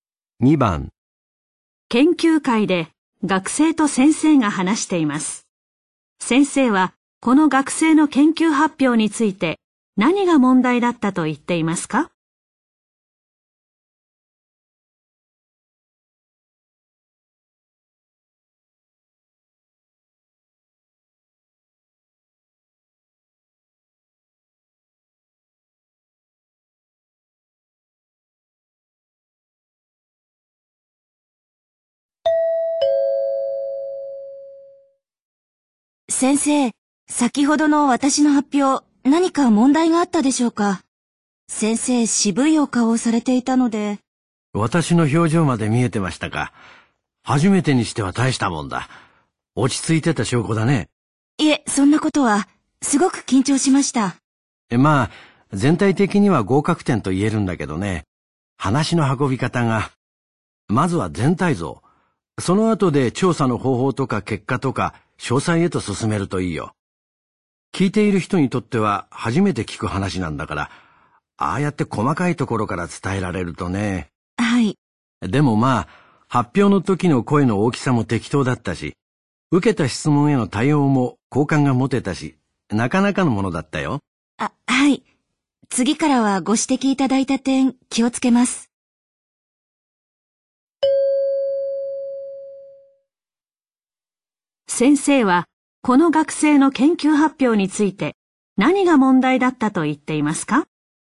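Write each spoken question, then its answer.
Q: 先生は、この学生の研究発表について、何が問題だったと言っていますか?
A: 話の順序(全体像より先に細かいところから話したこと)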